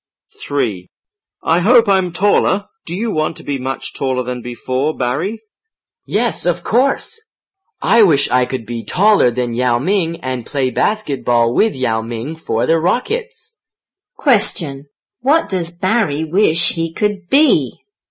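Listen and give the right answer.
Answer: Taller than Yao Ming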